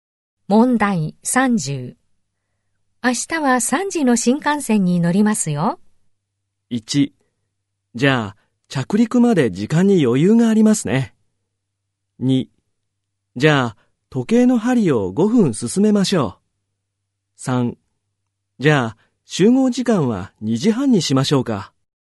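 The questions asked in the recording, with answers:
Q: 明日は3時の新幹線に乗りますよ。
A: 3: じゃあ、集合時間は2時半にしましょうか。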